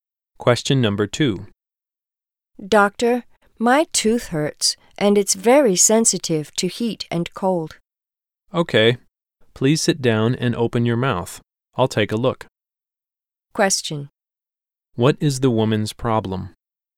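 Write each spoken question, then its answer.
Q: What is the woman's problem?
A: Her tooth hurts and is sensitive to heat and cold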